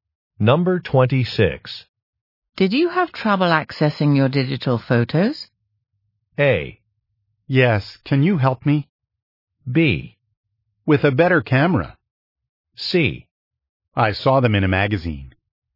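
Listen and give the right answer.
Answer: A: Yes, can you help me?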